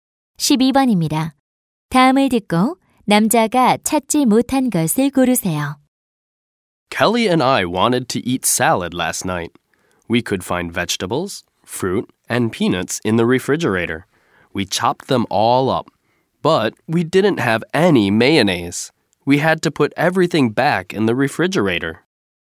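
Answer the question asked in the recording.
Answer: 마요네즈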